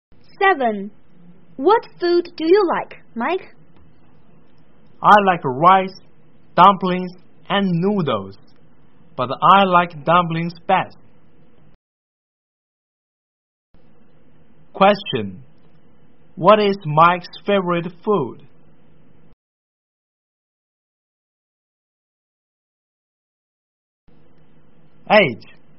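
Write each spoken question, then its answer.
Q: Question. What is Mike's favorite food?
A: Dumplings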